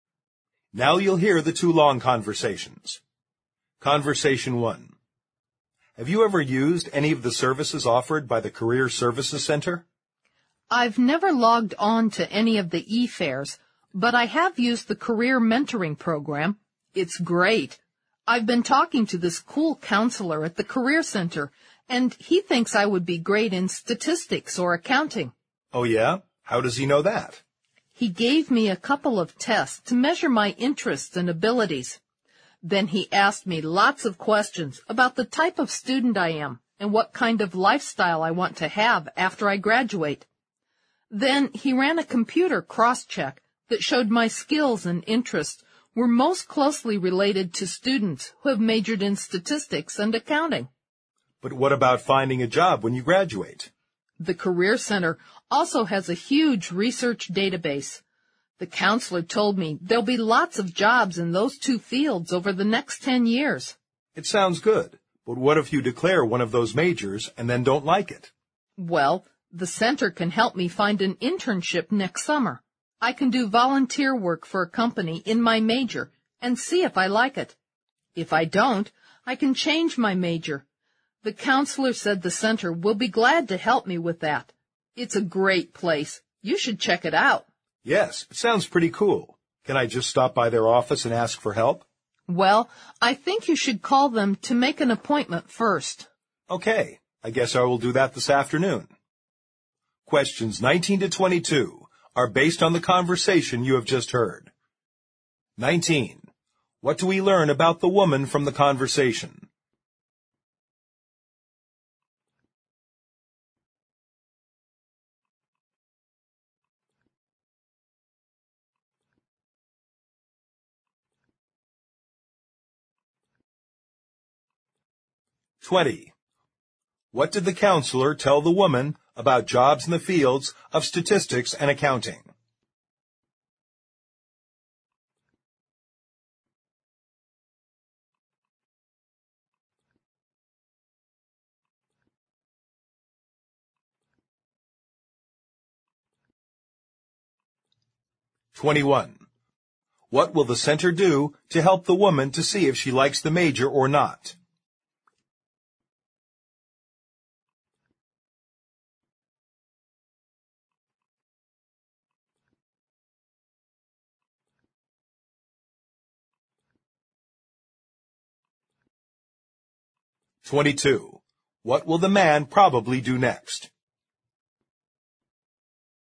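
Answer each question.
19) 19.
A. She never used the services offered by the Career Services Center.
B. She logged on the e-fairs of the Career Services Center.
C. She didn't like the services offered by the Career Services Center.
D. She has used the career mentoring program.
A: She has used the career mentoring program.

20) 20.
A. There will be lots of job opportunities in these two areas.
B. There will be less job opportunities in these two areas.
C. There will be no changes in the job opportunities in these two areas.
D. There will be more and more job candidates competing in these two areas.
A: There will be lots of job opportunities in these two areas.

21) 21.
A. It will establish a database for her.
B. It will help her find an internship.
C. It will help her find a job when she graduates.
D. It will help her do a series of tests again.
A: It will help her find an internship.

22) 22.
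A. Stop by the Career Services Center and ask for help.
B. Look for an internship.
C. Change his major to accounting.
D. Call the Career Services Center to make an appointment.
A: Call the Career Services Center to make an appointment.

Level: 六级

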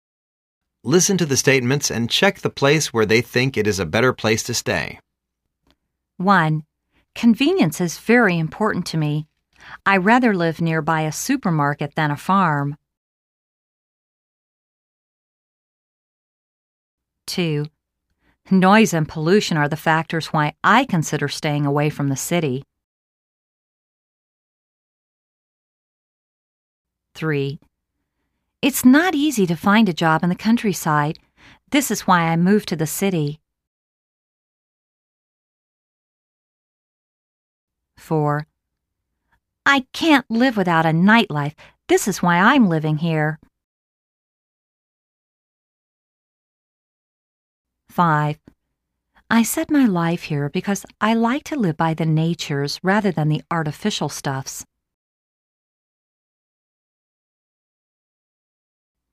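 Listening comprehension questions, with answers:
Listen to the statements and check the place where they think is a better place to stay.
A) City is better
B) Countryside is better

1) Convenience is very important to me. I rather live near by a supermarket than a farm.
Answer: City is better

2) Noise and pollution are the factors why I consider staying away from the city.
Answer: Countryside is better

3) lt's not easy to find a job in the countryside. This is why I moved to the city.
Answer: City is better

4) I can't live without a nightlife this is why l'm living here.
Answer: City is better

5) I set my life here because I like to live by the natures rather than the artificial stuffs.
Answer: Countryside is better

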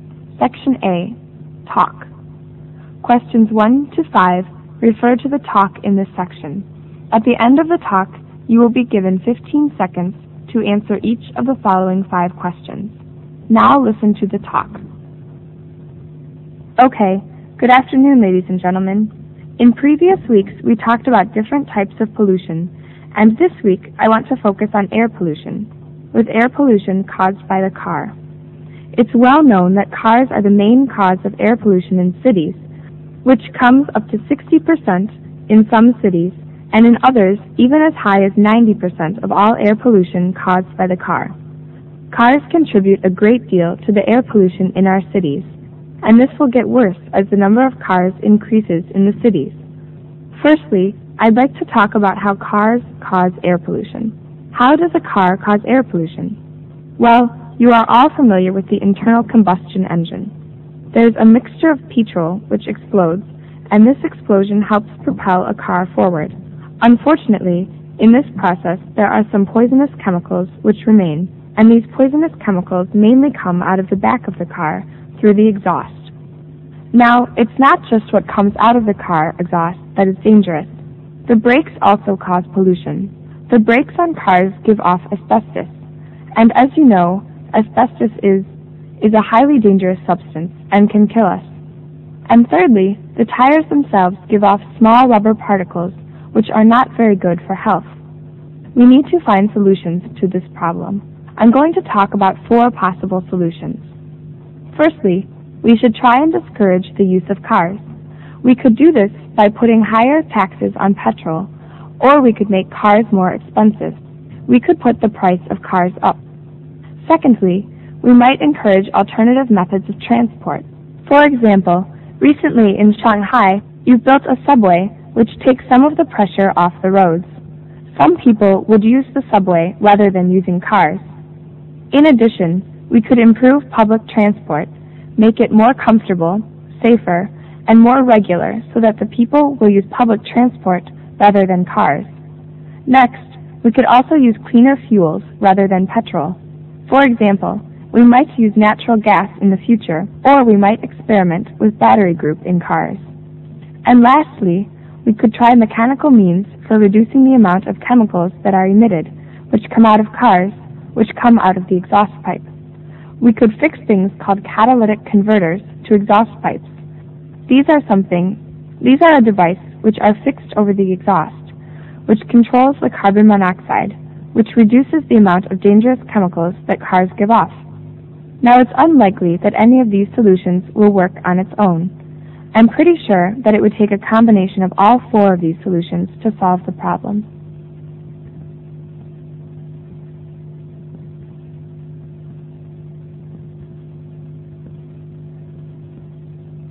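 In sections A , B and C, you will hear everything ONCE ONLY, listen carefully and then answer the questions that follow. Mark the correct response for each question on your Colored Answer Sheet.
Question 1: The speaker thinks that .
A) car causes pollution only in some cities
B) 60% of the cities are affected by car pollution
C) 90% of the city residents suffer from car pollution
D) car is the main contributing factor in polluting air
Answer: car is the main contributing factor in polluting air

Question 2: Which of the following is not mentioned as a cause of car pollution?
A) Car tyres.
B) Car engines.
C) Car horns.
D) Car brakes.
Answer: Car horns.

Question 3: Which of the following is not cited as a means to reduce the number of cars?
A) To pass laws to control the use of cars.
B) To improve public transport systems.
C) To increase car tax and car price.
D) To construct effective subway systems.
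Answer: To pass laws to control the use of cars.

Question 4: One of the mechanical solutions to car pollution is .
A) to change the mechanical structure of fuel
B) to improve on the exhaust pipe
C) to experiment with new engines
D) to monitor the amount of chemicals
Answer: to improve on the exhaust pipe

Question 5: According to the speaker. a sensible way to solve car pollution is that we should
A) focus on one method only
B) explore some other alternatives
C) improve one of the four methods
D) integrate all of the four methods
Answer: integrate all of the four methods

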